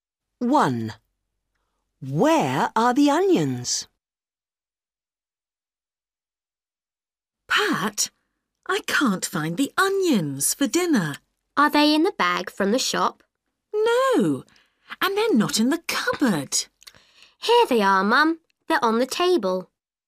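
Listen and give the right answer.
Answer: On the table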